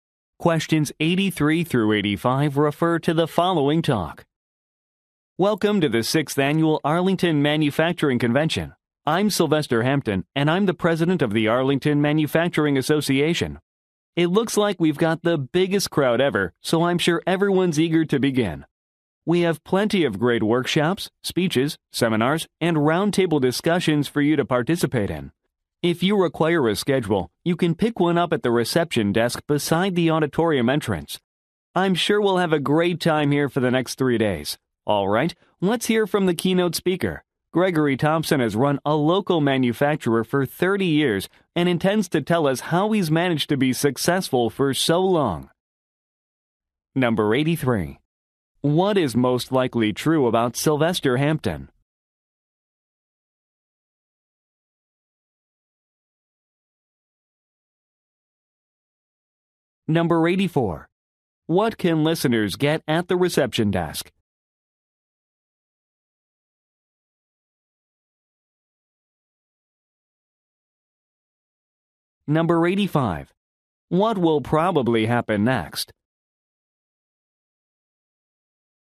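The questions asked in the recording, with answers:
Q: What is most likely true about Sylvester Hampton?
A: He is president of the Arlington Manufacturing Association

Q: What can listeners get at the reception desk?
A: A schedule

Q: What will probably happen next?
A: The keynote speaker, Gregory Thompson, will speak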